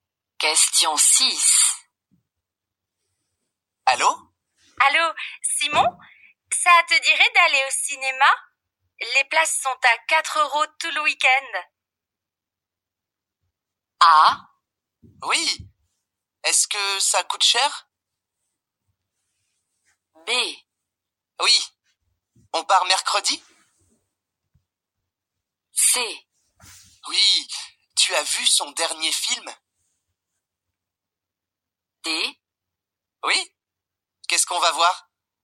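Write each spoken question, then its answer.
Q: Allô, Simon? Ça te dirait d'aller au cinéma?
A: D: Oui. Qu'est-ce qu'on va voir?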